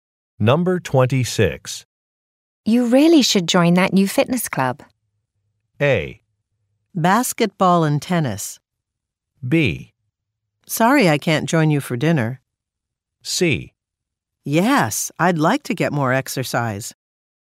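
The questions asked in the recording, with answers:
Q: You really should join that new fitness club.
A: C: Yes, I'd like to get more exercise.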